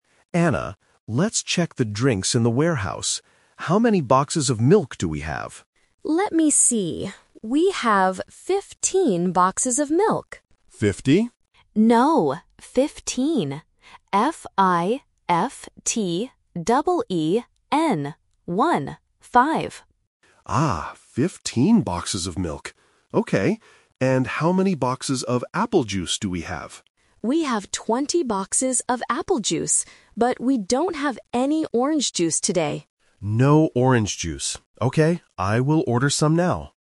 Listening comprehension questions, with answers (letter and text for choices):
Listen to the conversation between a manager and a warehouse worker, and choose the correct answer (A, B, or C) for each question.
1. How many boxes of milk do they have?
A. 15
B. 50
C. 5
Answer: A. 15

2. How does the woman spell the number of milk boxes?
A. F-I-V-E-T-E-E-N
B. F-I-F-T-Y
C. F-I-F-T-E-E-N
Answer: C. F-I-F-T-E-E-N

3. What drink do they need to order?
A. Apple juice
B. Orange juice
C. Milk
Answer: B. Orange juice

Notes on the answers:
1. The woman explicitly says they have "fifteen" boxes of milk. Option (B) 50 is The Trap: the manager mishears and asks "Fifty?", but the woman corrects him by saying "No, fifteen." Option (C) 5 is a distractor with a similar starting sound.
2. To make sure the manager understands, the woman spells the word clearly: "F-I-F-T-E-E-N". Option (B) is the spelling for fifty, which is the trap number. Option (A) is grammatically incorrect but looks like a plausible trap for beginners.
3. The woman says "we don't have any orange juice today" and the man says "I will order some now." Option (A) Apple juice is The Trap: it is mentioned, but they already have 20 boxes of it. Option (C) Milk is incorrect because they just counted 15 boxes of it.

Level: A1